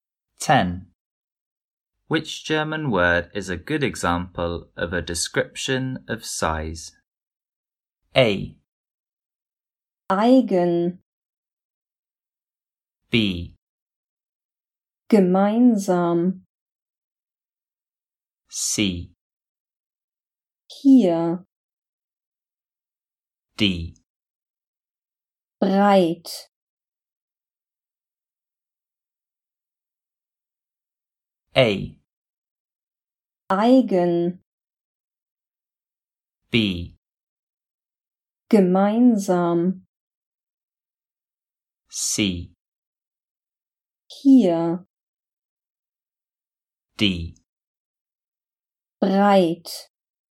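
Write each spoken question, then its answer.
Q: Which German word is a good example of a description of size?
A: D: Breit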